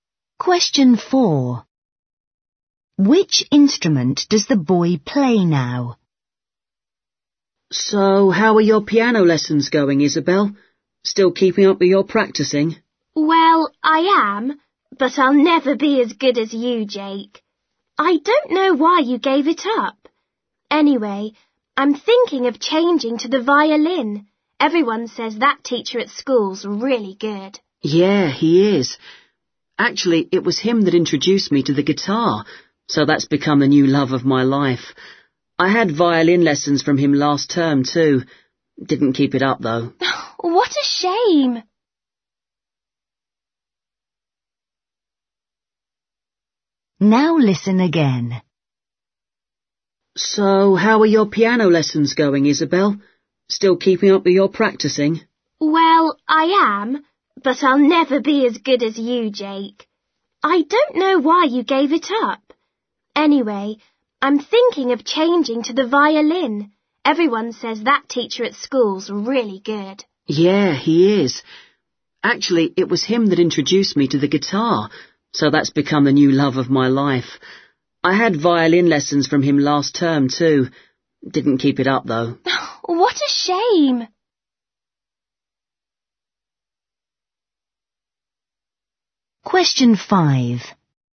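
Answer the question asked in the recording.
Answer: the guitar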